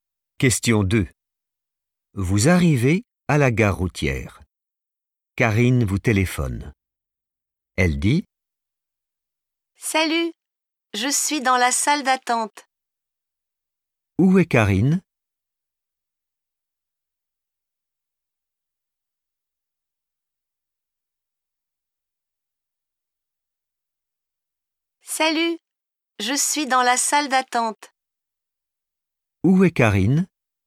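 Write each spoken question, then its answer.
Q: Où est Karine?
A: dans la salle d'attente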